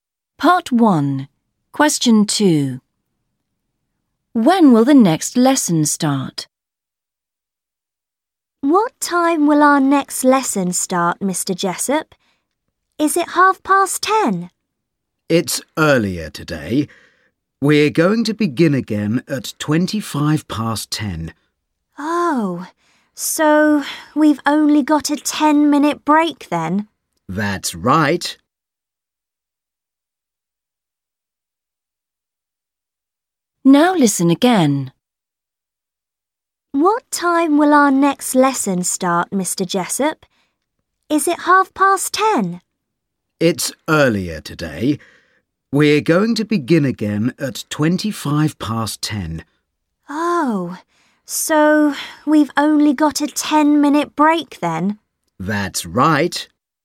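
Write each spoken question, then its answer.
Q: When will the next lesson start?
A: 10:25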